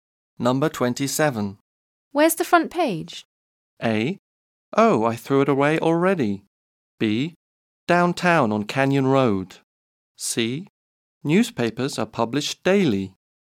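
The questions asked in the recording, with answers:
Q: Where's the front page?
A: A: Oh, I threw it away already.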